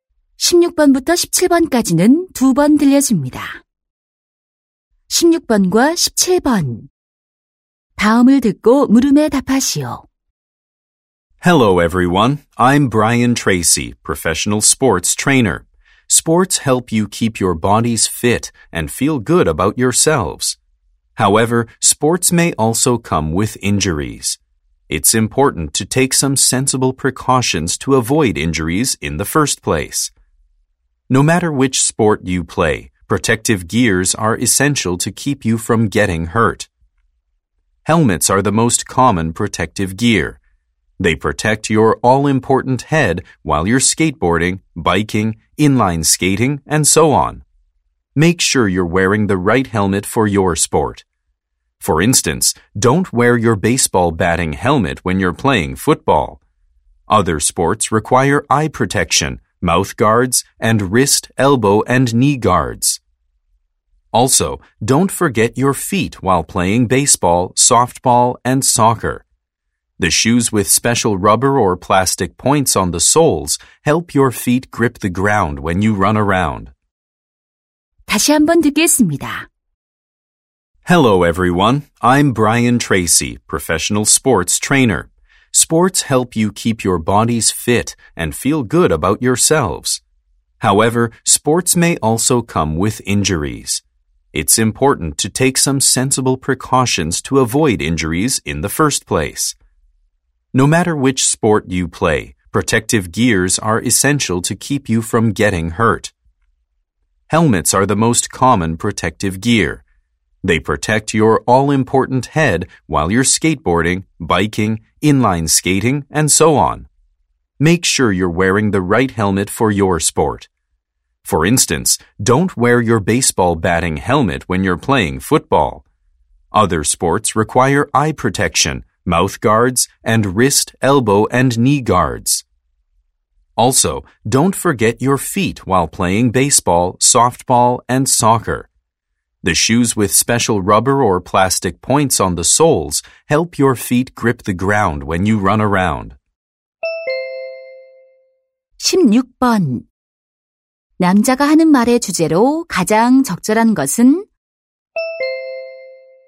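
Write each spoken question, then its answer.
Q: 남자가 하는 말의 주제로 가장 적절한 것은?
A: 부상 예방을 위한 운동 보호 장비의 중요성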